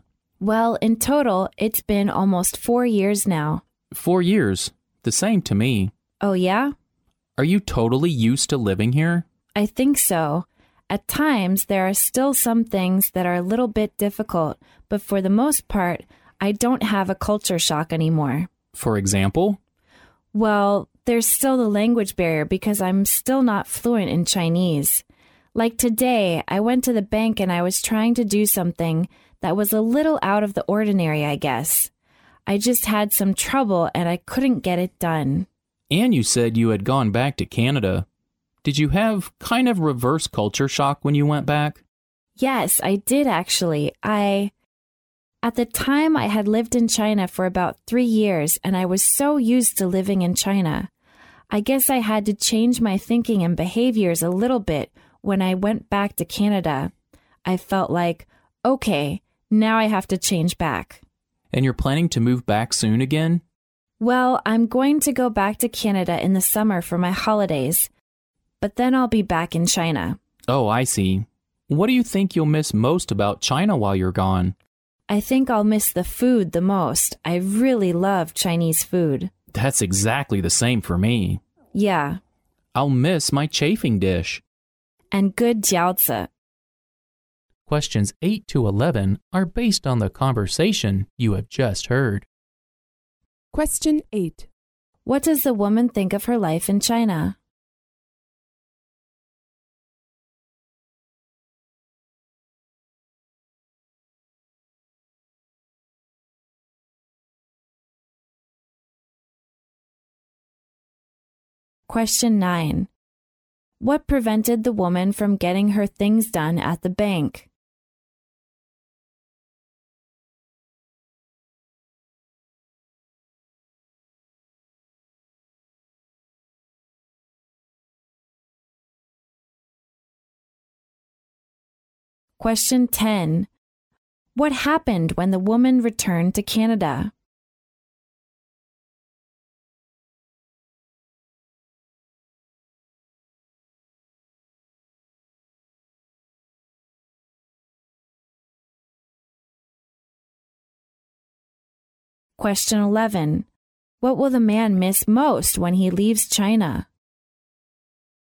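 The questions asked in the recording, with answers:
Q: What does the woman think of her life in China?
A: She is mostly used to it and no longer has culture shock.

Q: What prevented the woman from getting her things done at the bank?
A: The language barrier; she isn't fluent in Chinese.

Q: What happened when the woman returned to Canada?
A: She experienced reverse culture shock.

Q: What will the man miss most when he leaves China?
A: Chinese food.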